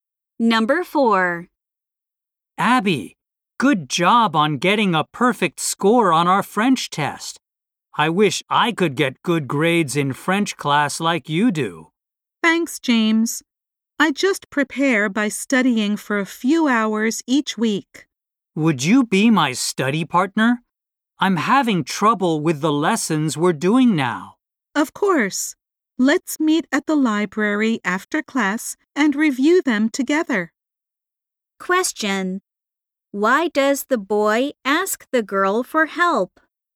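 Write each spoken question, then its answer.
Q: Why does the boy ask the girl for help?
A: He is having trouble with the current French lessons.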